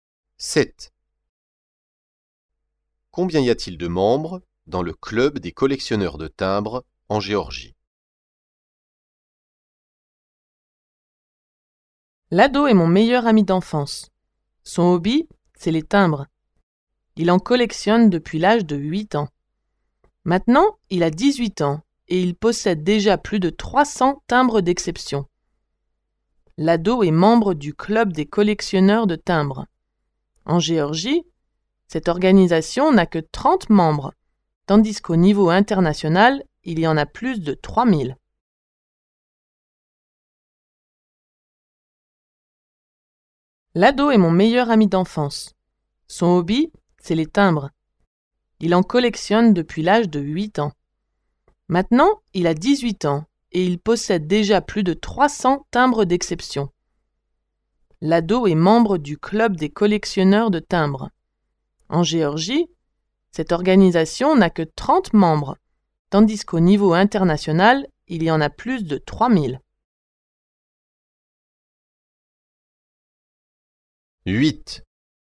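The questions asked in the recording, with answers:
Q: Combien y a-t-il de membres dans le club des collectionneurs de timbres en Géorgie?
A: 30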